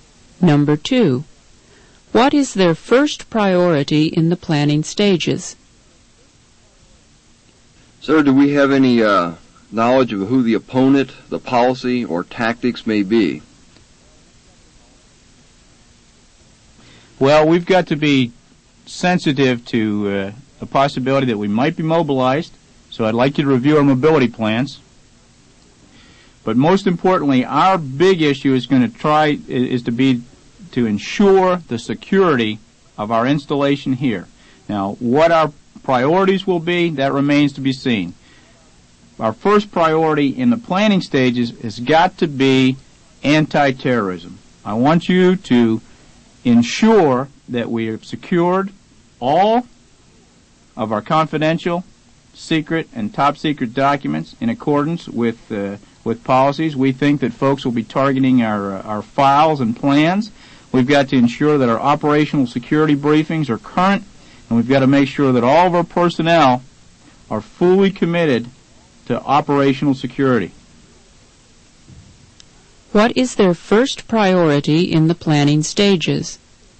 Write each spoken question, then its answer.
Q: What is their first priority in the planning stages?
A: The answer is C.